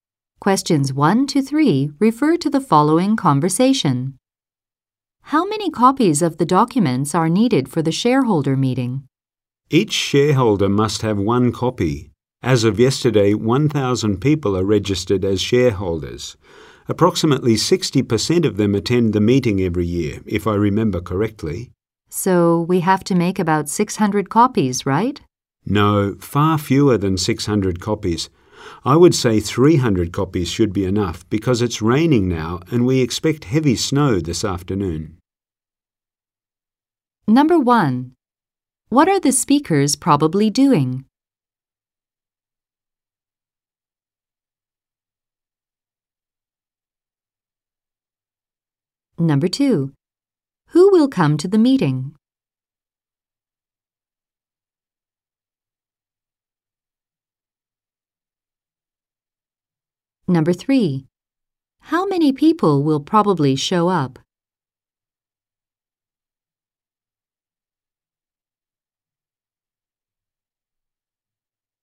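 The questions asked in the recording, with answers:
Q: What are the speakers probably doing?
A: Preparing copies of documents for a shareholder meeting

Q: Who will come to the meeting?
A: Shareholders

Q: How many people will probably show up?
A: About 300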